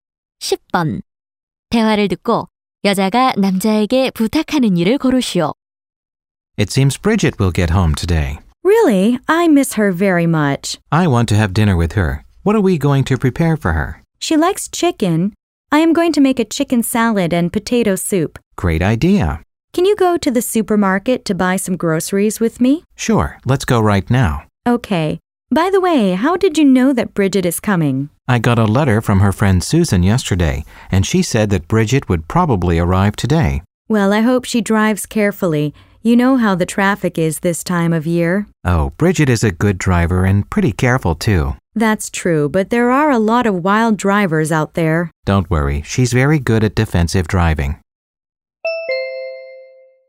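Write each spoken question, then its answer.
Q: 대화를 듣고 여자가 남자에게 부탁하는 일을 고르시오.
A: 함께 슈퍼마켓에 장 보러 가기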